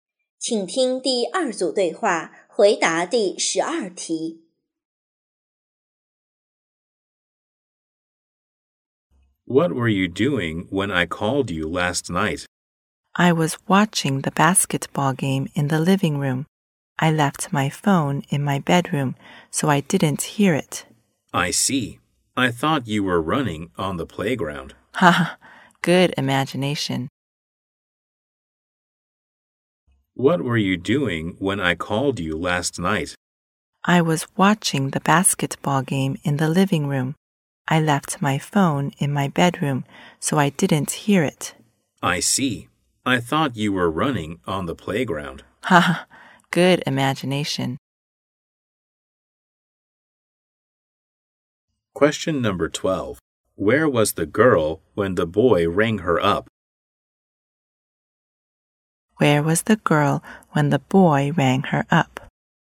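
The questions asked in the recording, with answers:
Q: Where was the girl when the boy rang her up?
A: In the living room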